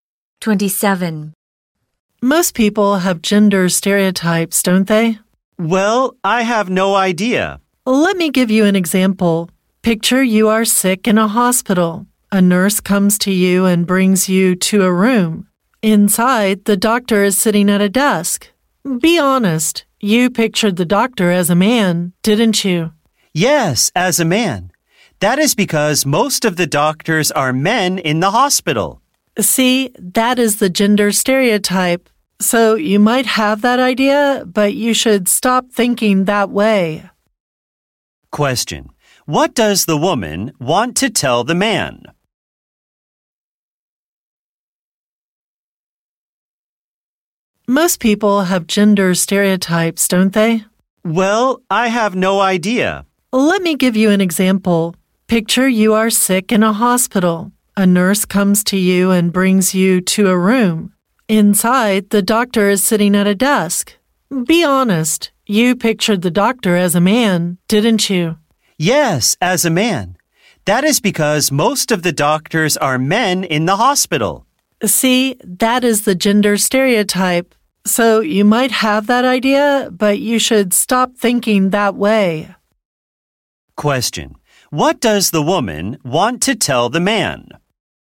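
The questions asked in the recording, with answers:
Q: Question: What does the woman want to tell the man?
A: He should stop having gender stereotypes (doctors aren't always men)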